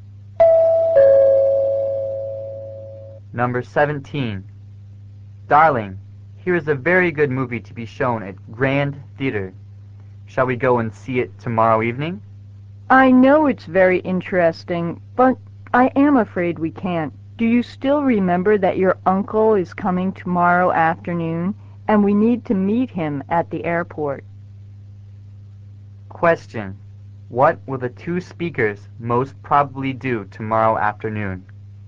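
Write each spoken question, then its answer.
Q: What will the two speakers most probably do tomorrow afternoon?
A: Meet their uncle at the airport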